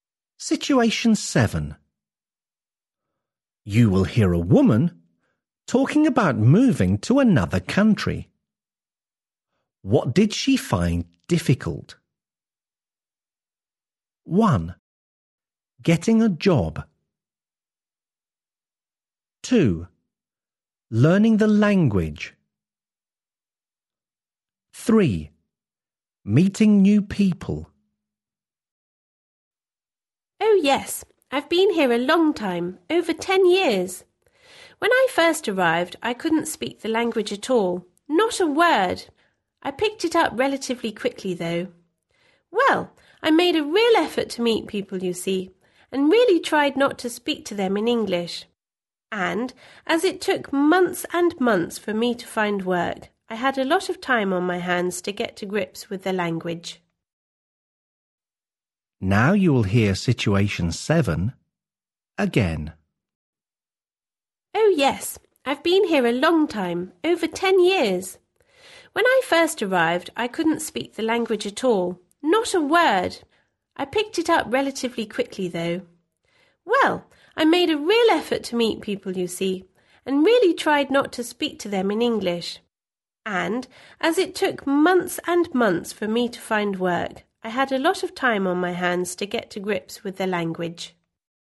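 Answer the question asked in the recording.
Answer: 1: Getting a job.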